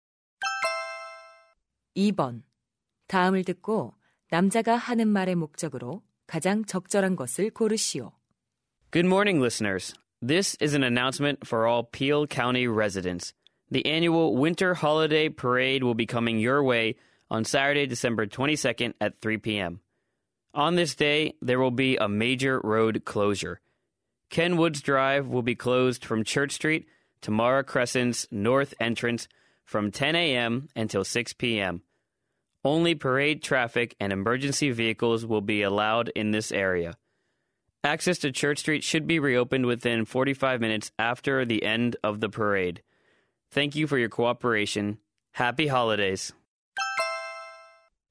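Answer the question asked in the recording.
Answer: 퍼레이드로 인한 도로 통제를 안내하려고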